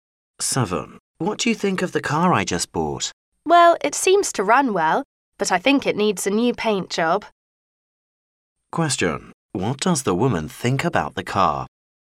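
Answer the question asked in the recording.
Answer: It runs well but needs a new paint job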